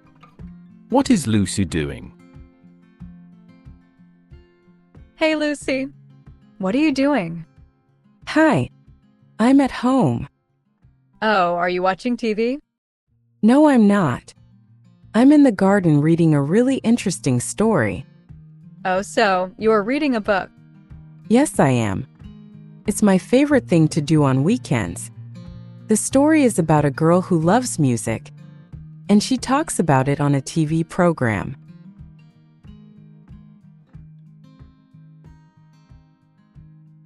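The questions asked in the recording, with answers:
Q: What is Lucy doing?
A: Reading a book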